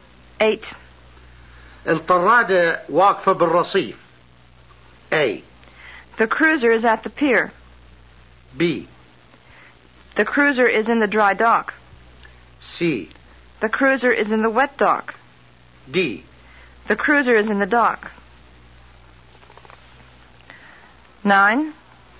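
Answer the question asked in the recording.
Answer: A: The cruiser is at the pier.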